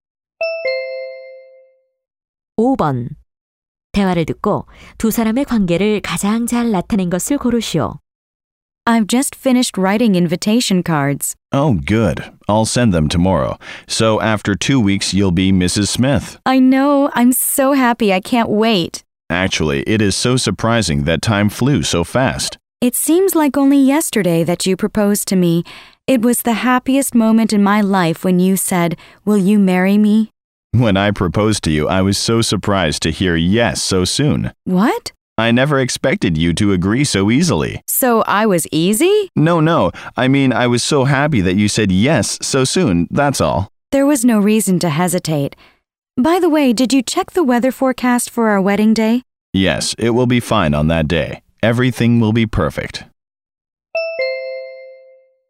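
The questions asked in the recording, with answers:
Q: 대화를 듣고 두 사람의 관계를 가장 잘 나타낸 것을 고르시오.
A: 결혼을 앞둔 약혼자 사이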